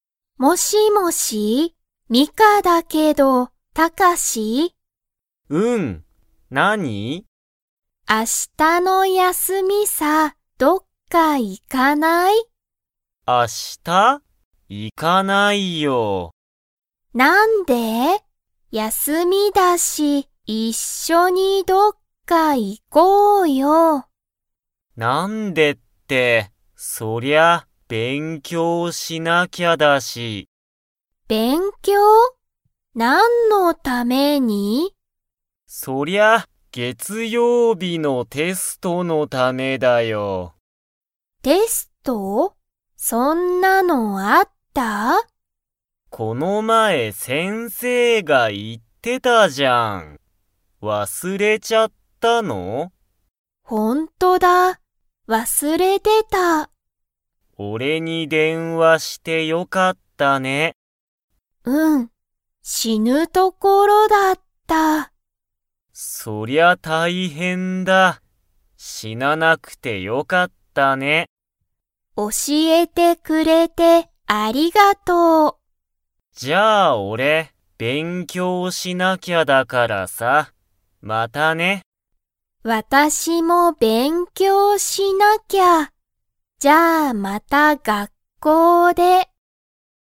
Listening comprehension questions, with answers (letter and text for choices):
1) ミカとタカシは明日(あした)、どこか行(い)きますか?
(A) はい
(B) いいえ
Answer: (B) いいえ

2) テストは、____ある。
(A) 月曜日(げつようび)に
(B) 火曜日(かようび)に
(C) 今日(きょう)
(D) 明日(あした)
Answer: (A) 月曜日(げつようび)に

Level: Level 2